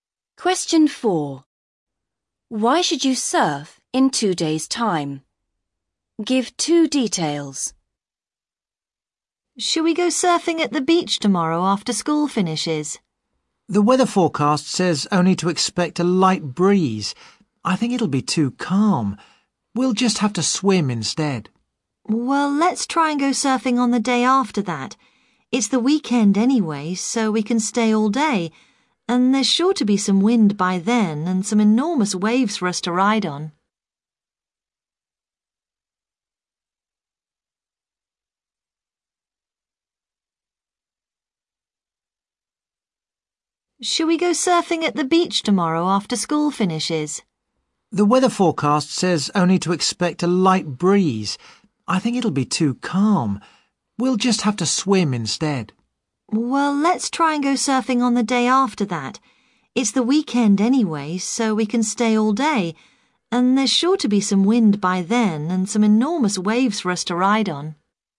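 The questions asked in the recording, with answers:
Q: Why should you surf in 2 days' time?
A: It's the weekend so you can stay all day, and there will be wind and enormous waves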